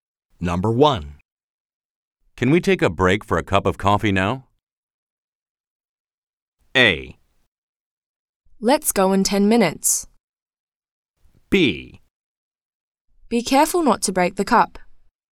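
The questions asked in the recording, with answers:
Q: Can we take a break for a cup of coffee now?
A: A: Let's go in 10 minutes.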